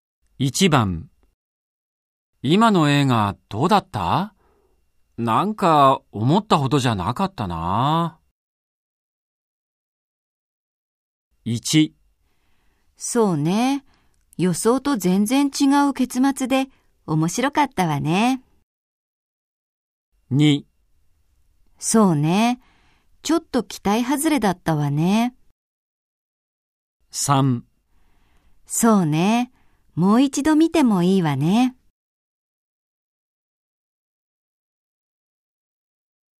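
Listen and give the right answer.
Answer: 2: そうね。ちょっと期待外れだったわね。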